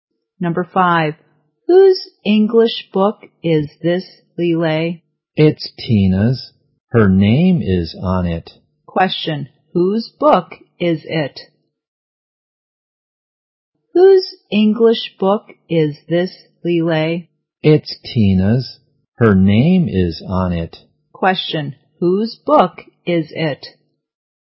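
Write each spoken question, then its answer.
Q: Question, whose book is it?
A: Tina's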